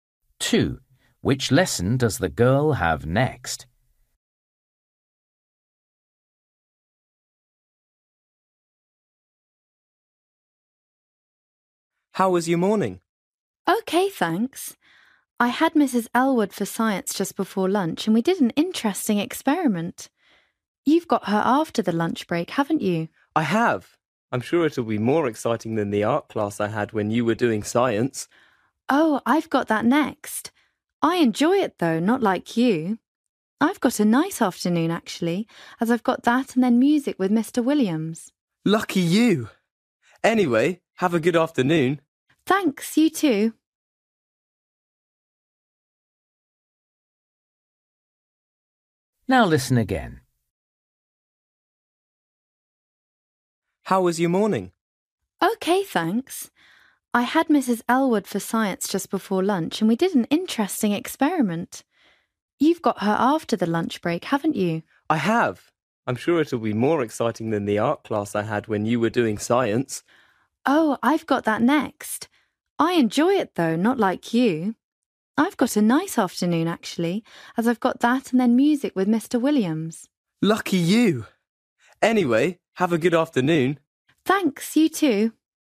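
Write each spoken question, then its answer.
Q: Which lesson does the girl have next?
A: Art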